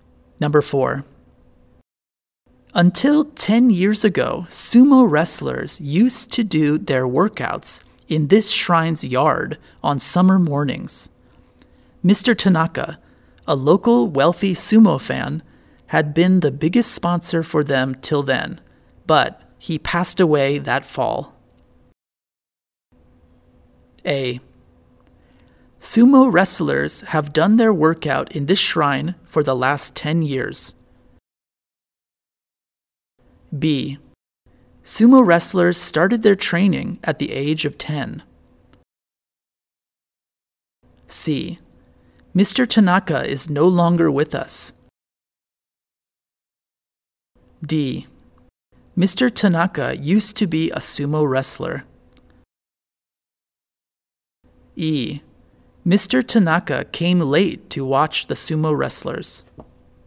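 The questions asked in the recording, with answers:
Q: Until 10 years ago, sumo wrestlers used to do their workouts in this shrine's yard on summer mornings.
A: C: Mr. Tanaka is no longer with us.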